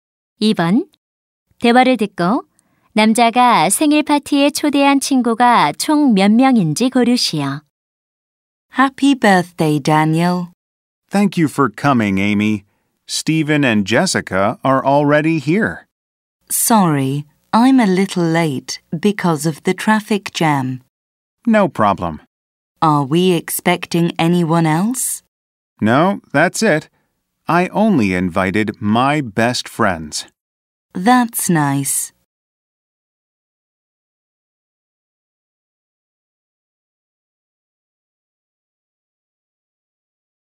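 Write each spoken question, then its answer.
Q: 대화를 듣고 남자가 생일 파티에 초대한 친구가 총 몇 명인지 고르시오.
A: 3명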